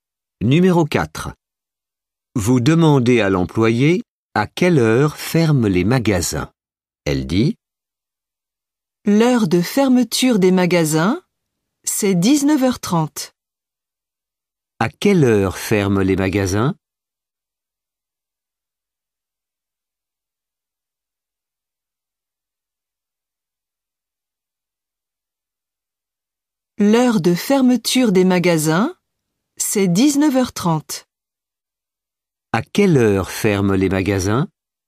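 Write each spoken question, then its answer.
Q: À quelle heure ferment les magasins?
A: 19h30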